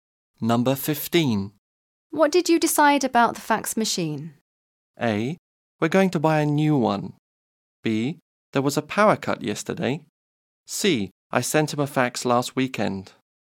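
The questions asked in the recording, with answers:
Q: What did you decide about the fax machine?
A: A: We're going to buy a new one.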